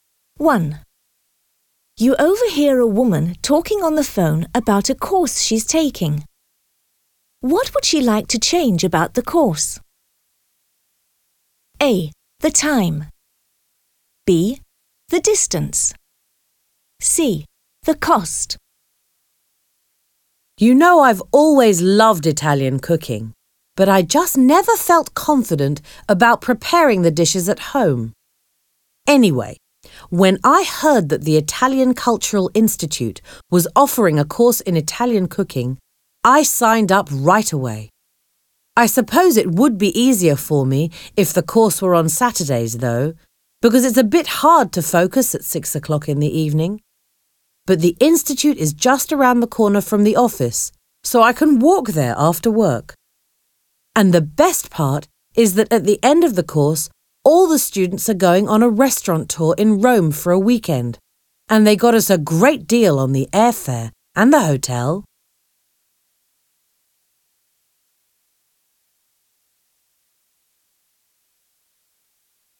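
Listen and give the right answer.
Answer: A: The time.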